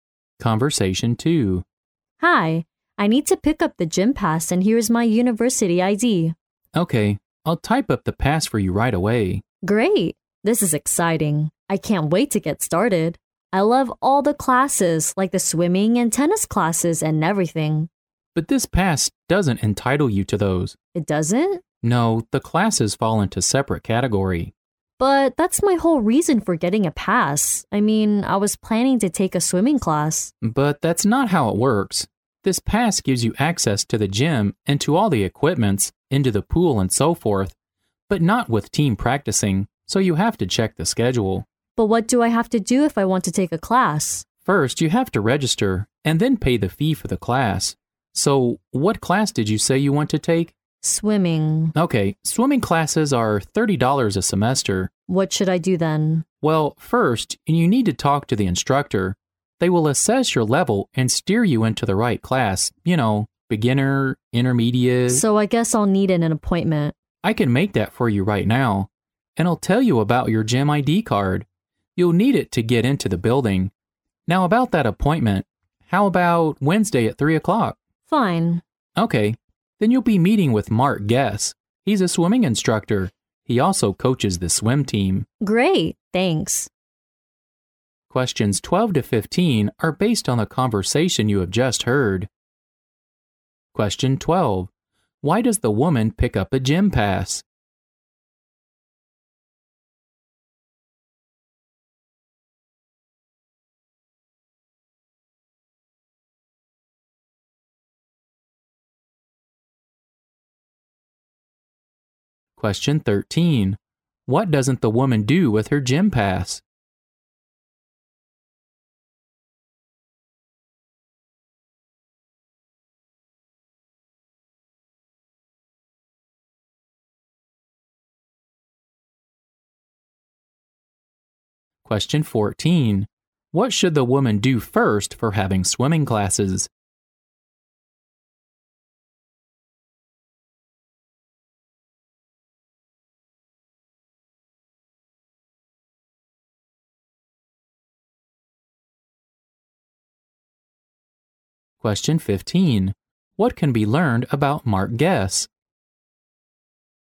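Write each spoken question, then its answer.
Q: Why does the woman pick up a gym pass?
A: To take a swimming class

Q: What can be learned about Mark Guess?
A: He is a swimming instructor who also coaches the swim team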